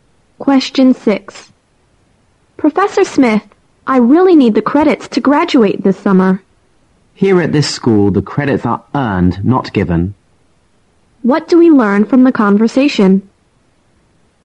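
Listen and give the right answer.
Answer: The professor won't just give the student the credits; the student has to earn them.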